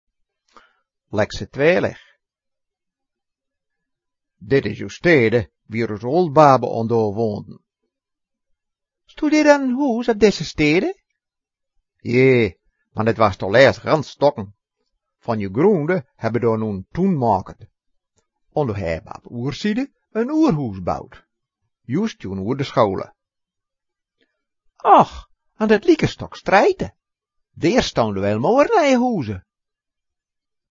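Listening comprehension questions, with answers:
Type one English word in the box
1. Wieruur baale do? Uur n .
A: house

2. Now it is .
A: garden

Type "weer" (true) or "nit weer" (not true) in the box.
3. Hier woonje uus Ooldbaabe un do.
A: nit weer

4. Dät Huus waas toulääst gans stukken.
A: weer

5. An dät lieke Stuk Sträite hääbe jo Tuun moaked.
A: nit weer

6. Deer stounde wäil moor oolde Huuse.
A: nit weer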